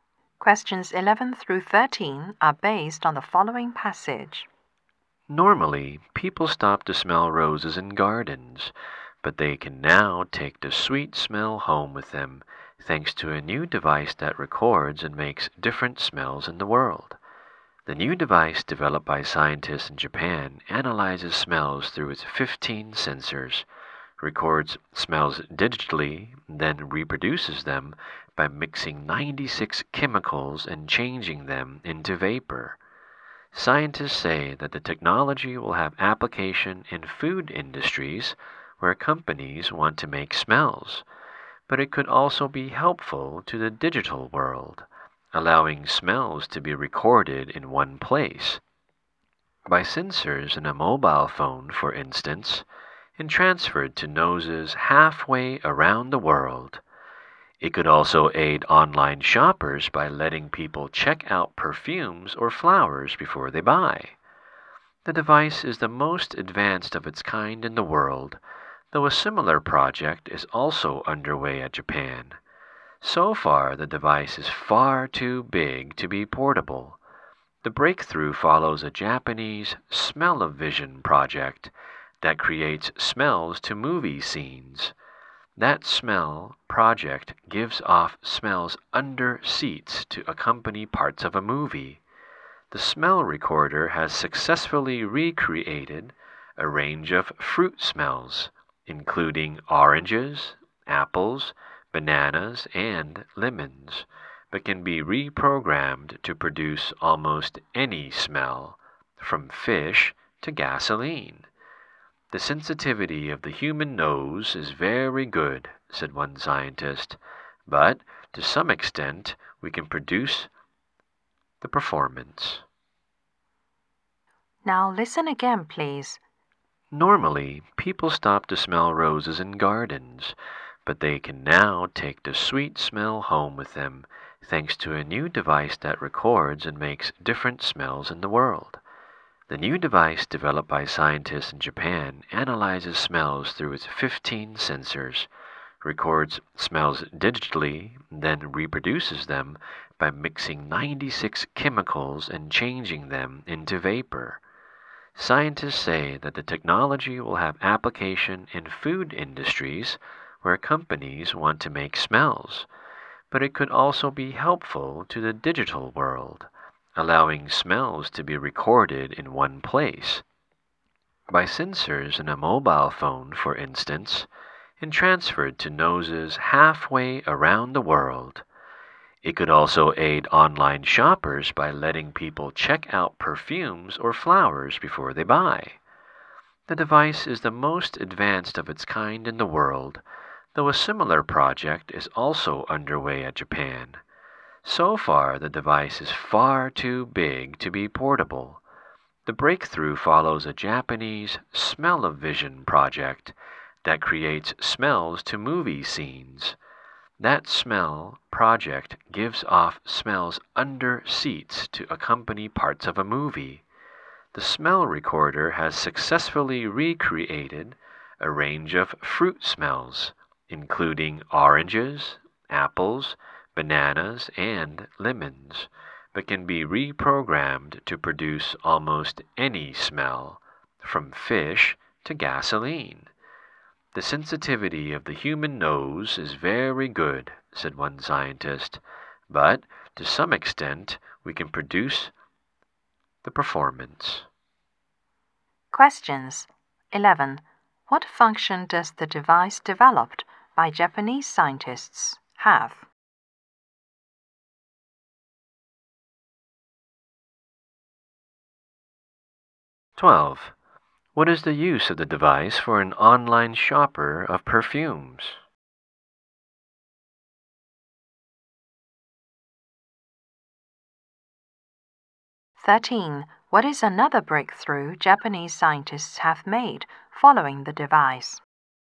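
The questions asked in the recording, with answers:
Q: What function does the device developed by Japanese scientists have?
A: It records and reproduces smells

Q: What is the use of the device for an online shopper of perfumes?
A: To check out the smell before buying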